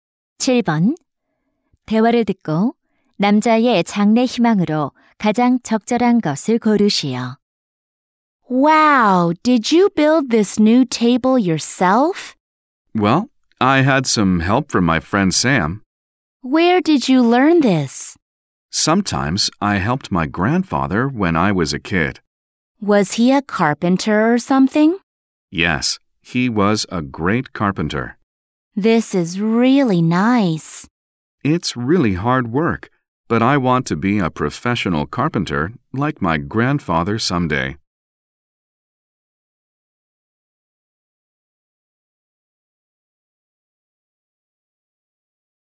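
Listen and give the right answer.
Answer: 목수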